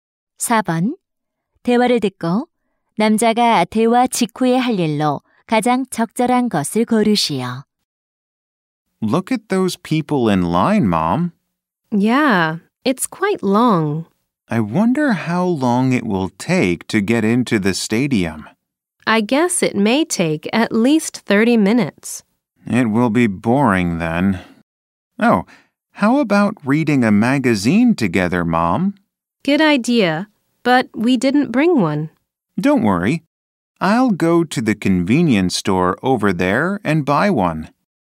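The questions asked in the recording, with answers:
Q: 대화를 듣고 남자가 대화 직후에 할 일로 가장 적절한 것을 고르시오.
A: 편의점에 가서 잡지 사기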